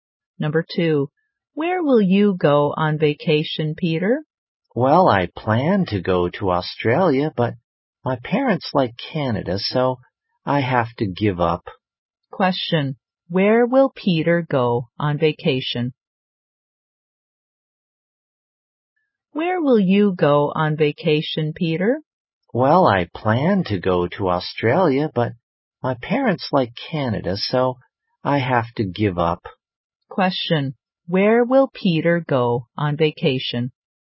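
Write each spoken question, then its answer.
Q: Question, where will Peter go on vacation?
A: Canada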